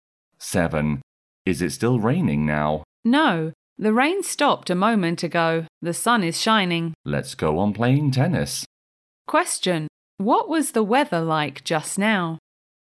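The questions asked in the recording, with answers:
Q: What was the weather like just now?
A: It was raining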